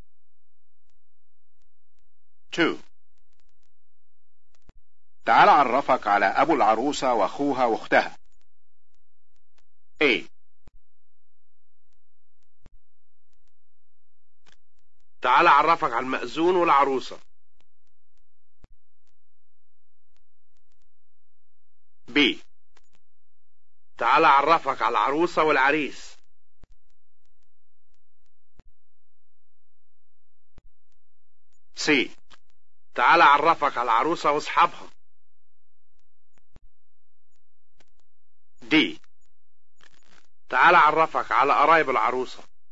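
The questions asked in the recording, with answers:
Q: تعال عرفك على أبو العروسة وأخوها وأختها.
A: D: تعال عرفك على قرايب العروسة.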